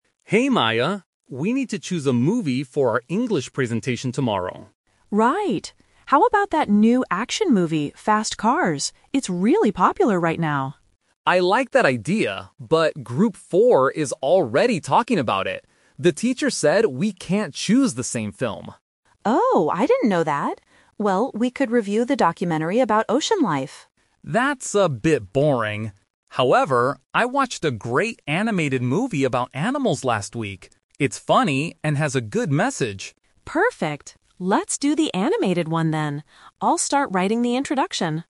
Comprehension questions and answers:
Listen to the conversation and choose the correct answer (A, B, or C) for each question.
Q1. What kind of movie will they talk about in their presentation?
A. An action movie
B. An animated movie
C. A horror movie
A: B. An animated movie

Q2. Why can't they choose the action movie?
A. Because another group is using it.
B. Because it is too boring.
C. Because they haven't seen it yet.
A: A. Because another group is using it.

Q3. What is Maya going to do next?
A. Talk to the teacher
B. Watch the movie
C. Write the introduction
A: C. Write the introduction

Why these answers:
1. Maya suggests an action movie first (Option A is the trap), but they change their minds. Alex suggests an animated movie, and Maya says "Perfect! Let's do the animated one". Option C is not mentioned.
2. Alex says they can't choose the action movie because "Group 4 is already talking about it." Option B is the trap because "boring" is the reason they didn't choose the documentary. Option C is not mentioned.
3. At the end of the conversation, Maya says, "I'll start writing the introduction." Option A is the trap because the "teacher" was mentioned earlier in the conversation. Option B is not mentioned.

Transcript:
Alex: Hey Maya, we need to choose a movie for our English presentation tomorrow.
Maya: Right. How about that new action movie, Fast Cars? It's really popular right now.
Alex: I like that idea, but Group 4 is already talking about it. The teacher said we can't choose the same film.
Maya: Oh, I didn't know that. Well, we could review the documentary about ocean life.
Alex: That's a bit boring. However, I watched a great animated movie about animals last week. It's funny and has a good message.

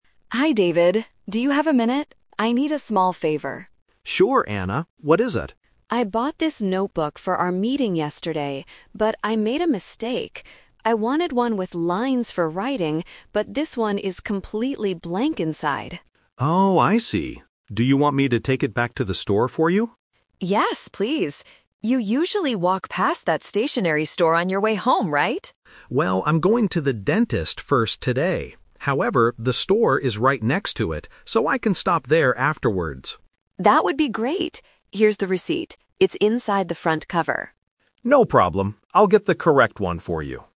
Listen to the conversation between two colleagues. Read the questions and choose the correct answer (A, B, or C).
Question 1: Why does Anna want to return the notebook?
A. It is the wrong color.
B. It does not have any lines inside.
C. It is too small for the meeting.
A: B. It does not have any lines inside.

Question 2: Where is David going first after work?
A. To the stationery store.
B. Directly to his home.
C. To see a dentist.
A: C. To see a dentist.

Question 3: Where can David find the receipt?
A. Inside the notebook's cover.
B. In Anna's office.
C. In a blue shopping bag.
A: A. Inside the notebook's cover.

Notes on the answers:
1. Anna mentions: "I wanted one with lines... but this one is completely blank." Why the trap is wrong: Options (A) and (C) are common reasons for returning goods, but they are not mentioned in this conversation.
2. This is the "Twist" technique. David says: "I'm going to the dentist first today." Why the trap is wrong: Option (A) is where he will go after the dentist. Option (B) is what he usually does, but his plan changed today.
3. Anna says: "Here's the receipt. It's inside the front cover." Why the trap is wrong: Option (C) is a common distractor in "Returning goods" topics, but in this specific script, the receipt is placed inside the book itself.

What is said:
Anna: Hi David. Do you have a minute? I need a small favor.
David: Sure, Anna. What is it?
Anna: I bought this notebook for our meeting yesterday, but I made a mistake. I wanted one with lines for writing, but this one is completely blank inside.
David: Oh, I see. Do you want me to take it back to the store for you?
Anna: Yes, please! You usually walk past that stationery store on your way home, right?
David: Well, I'm going to the dentist first today. However, the store is right next to it, so I can stop there afterwards.
Anna: That would be great! Here's the receipt. It's inside the front cover.
David: No problem. I'll get the correct one for you.

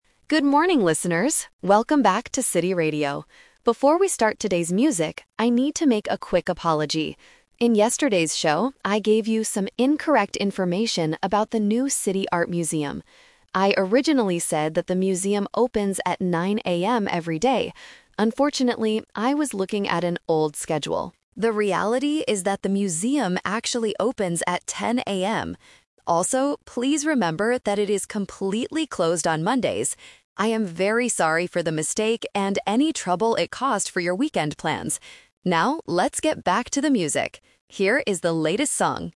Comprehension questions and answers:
Listen to the radio announcement and choose the correct answer (A, B, or C).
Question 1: What is the radio host apologizing for?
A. Playing the wrong song.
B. Giving incorrect information.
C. Closing the radio station.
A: B. Giving incorrect information.

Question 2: What time does the museum actually open?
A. 9:00 AM.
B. 10:00 AM.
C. 11:00 AM.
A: B. 10:00 AM.

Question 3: When is the museum closed?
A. On Mondays.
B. On weekends.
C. On Fridays.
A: A. On Mondays.

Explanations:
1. The host says, "I gave you some incorrect information about the new City Art Museum" and apologizes for the mistake. Trap: Option (A) is a trap because the host mentions "music" and "latest song" at the end, but he didn't play the wrong song. Option (C) uses the word "closed", but it is the museum that is closed, not the radio station.
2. The host corrects himself by saying, "The reality is that the museum actually opens at 10:00 AM." Trap: Option (A) is the classic "Expectation vs. Reality" trap. 9:00 AM is the time he said yesterday, not the correct time. Option (C) is not mentioned.
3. The host clearly states, "please remember that it is completely closed on Mondays." Trap: Option (B) is a trap because the word "weekend" is mentioned later ("trouble it caused for your weekend plans"), but the museum is not closed then. Option (C) is not mentioned.

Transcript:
Radio Host: Good morning, listeners! Welcome back to City Radio. Before we start today's music, I need to make a quick apology. In yesterday's show, I gave you some incorrect information about the new City Art Museum. I originally said that the museum opens at 9:00 AM every day. Unfortunately, I was looking at an old schedule. The reality is that the museum actually opens at 10:00 AM. Also, please remember that it is completely closed on Mondays. I am very sorry for the mistake and any trouble it caused for your weekend plans. Now, let's get back to the music! Here is the latest song...

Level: A2

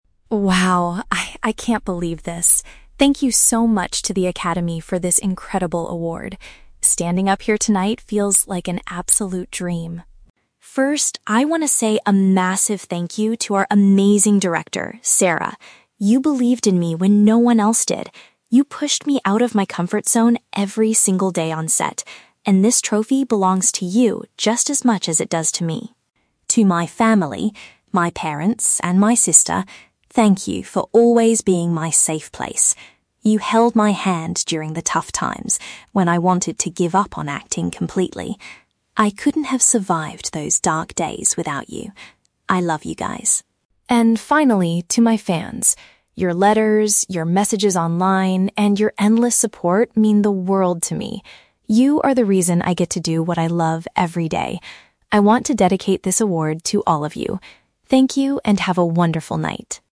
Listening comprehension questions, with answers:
Listen to an actor giving an award acceptance speech. Choose the correct answer (A, B, or C) for each question.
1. Why does the actor specifically thank the director, Sarah?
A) Because she wrote the original script for the movie.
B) Because she encouraged him to try things that were not easy or familiar.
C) Because she gave him his very first job in the film industry.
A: B) Because she encouraged him to try things that were not easy or familiar.

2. What did the actor's family do for him in the past?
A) They gave him the money he needed to travel to acting auditions.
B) They helped him practice and memorize his lines for the film.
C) They supported him when he thought about quitting his career entirely.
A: C) They supported him when he thought about quitting his career entirely.

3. Who does the actor dedicate the award to at the end of the speech?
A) His loyal followers and audience.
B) His parents and his sister.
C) The other actors working on the set.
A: A) His loyal followers and audience.

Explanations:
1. The actor says the director "pushed me out of my comfort zone" (which paraphrases to encouraging him to try things that were not easy or familiar). Why the traps are wrong: (A) and (C) are both traps. They are plausible reasons to thank a director in the movie industry, but neither writing the script nor giving him his first job is mentioned in the speech.
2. The actor says his family held his hand during tough times when he "wanted to give up on acting completely" (which paraphrases to thinking about quitting his career entirely). Why the traps are wrong: (A) and (B) are traps. Giving financial support or helping memorize lines are common ways families support actors, but they are never mentioned in the audio.
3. The actor explicitly says, "And finally, to my fans... I want to dedicate this award to all of you." (His "loyal followers and audience" is a paraphrase for "fans"). Why the traps are wrong: (B) is a trap. He thanks his parents and sister earlier in the speech, but he does not dedicate the award to them. (C) is a trap. He mentions being "on set," but he never thanks the other actors.

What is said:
Actor: "Wow. I... I can't believe this. Thank you so much to the academy for this incredible award. Standing up here tonight feels like an absolute dream.
First, I want to say a massive thank you to our amazing director, Sarah. You believed in me when no one else did. You pushed me out of my comfort zone every single day on set, and this trophy belongs to you just as much as it does to me.
To my family—my parents and my sister—thank you for always being my safe place. You held my hand during the tough times when I wanted to give up on acting completely. I couldn't have survived those dark days without you. I love you guys.
And finally, to my fans. Your letters, your messages online, and your endless support mean the world to me. You are the reason I get to do what I love every day.

